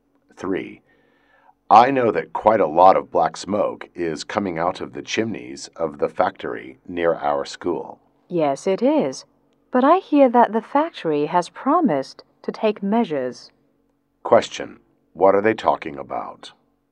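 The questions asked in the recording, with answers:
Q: What are they talking about?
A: Air pollution from the factory near their school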